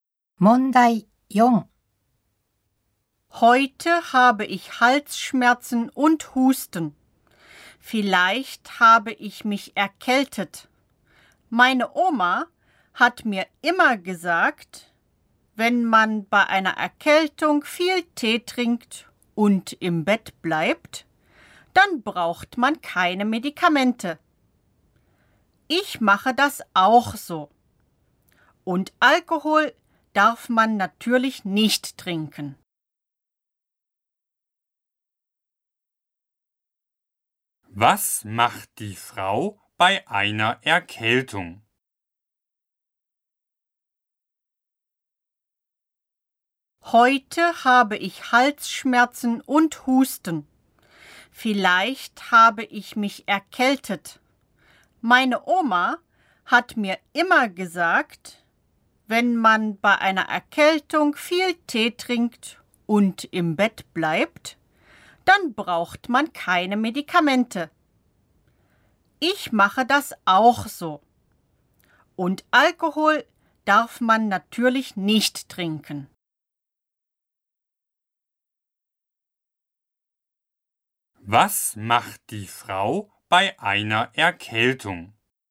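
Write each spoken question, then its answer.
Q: Was macht die Frau bei einer Erkältung?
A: Sie trinkt viel Tee und bleibt im Bett.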